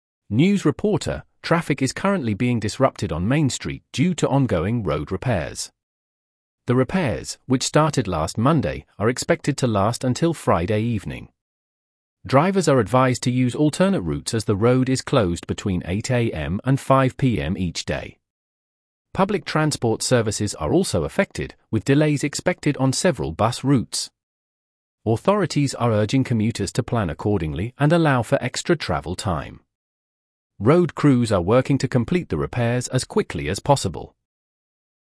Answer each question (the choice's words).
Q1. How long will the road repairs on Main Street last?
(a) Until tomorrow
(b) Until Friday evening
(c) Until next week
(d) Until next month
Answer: Until Friday evening

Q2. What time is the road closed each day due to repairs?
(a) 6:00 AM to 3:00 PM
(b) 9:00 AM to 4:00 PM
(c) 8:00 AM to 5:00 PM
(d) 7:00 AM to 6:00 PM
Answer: 8:00 AM to 5:00 PM

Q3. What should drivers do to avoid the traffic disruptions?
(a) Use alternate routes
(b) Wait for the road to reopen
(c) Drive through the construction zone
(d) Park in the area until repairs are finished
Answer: Use alternate routes

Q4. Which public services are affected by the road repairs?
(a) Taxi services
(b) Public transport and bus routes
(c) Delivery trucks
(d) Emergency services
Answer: Public transport and bus routes

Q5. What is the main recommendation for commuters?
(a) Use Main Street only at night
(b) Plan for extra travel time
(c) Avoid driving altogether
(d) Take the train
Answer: Plan for extra travel time

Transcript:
News Reporter: "Traffic is currently being disrupted on Main Street due to ongoing road repairs. The repairs, which started last Monday, are expected to last until Friday evening. Drivers are advised to use alternate routes as the road is closed between 8:00 AM and 5:00 PM each day. Public transport services are also affected, with delays expected on several bus routes. Authorities are urging commuters to plan accordingly and allow for extra travel time. Road crews are working to complete the repairs as quickly as possible."